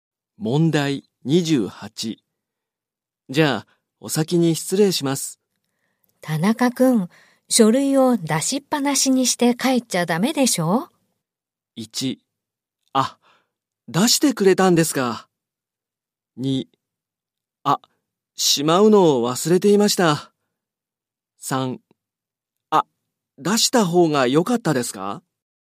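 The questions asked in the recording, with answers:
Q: じゃあ、お先に失礼します。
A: 2: あ、しまうのを忘れていました。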